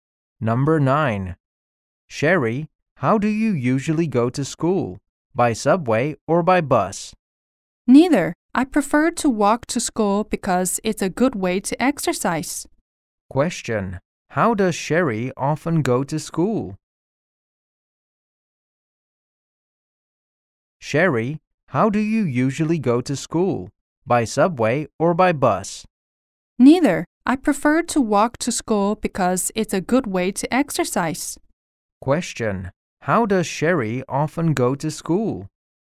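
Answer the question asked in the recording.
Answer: On foot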